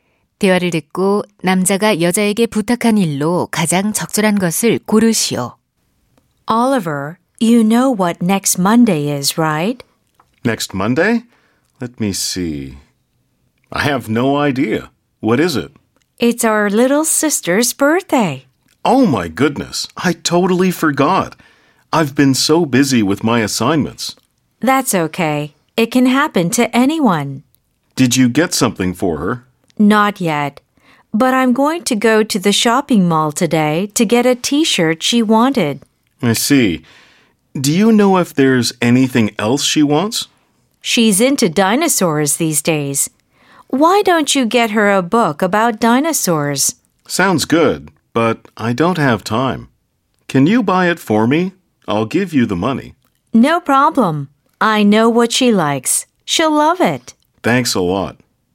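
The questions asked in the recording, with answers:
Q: 대화를 듣고 남자가 여자에게 부탁한 일로 가장 적절한 것을 고르시오.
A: 공룡에 관한 책 사 오기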